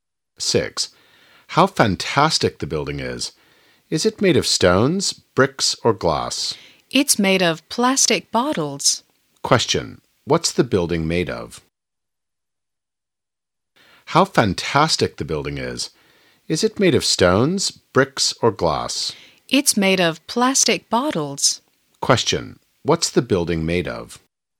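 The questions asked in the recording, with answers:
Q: What's the building made of?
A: Plastic bottles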